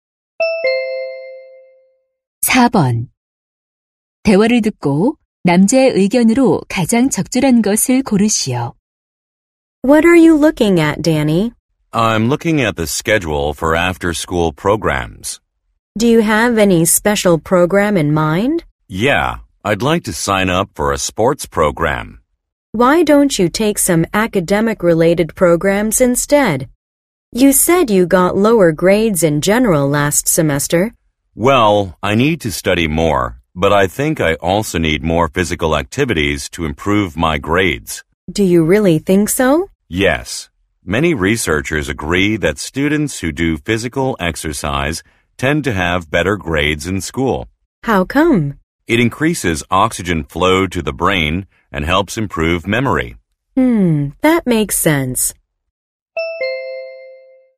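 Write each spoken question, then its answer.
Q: 대화를 듣고 남자의 의견으로 가장 적절한 것을 고르시오.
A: 신체 활동은 학업 성적 향상에 도움이 된다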